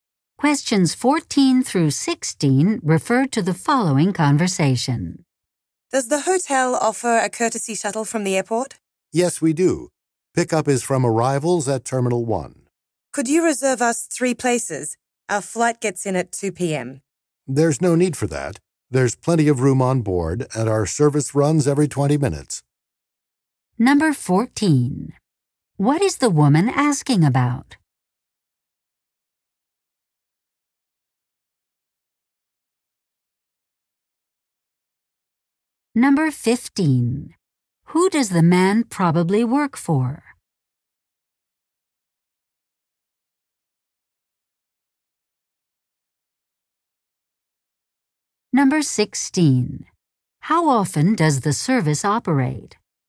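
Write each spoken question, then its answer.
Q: What is the woman asking about?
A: An airport shuttle service from the hotel

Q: Who does the man probably work for?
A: A hotel

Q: How often does the service operate?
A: Every 20 minutes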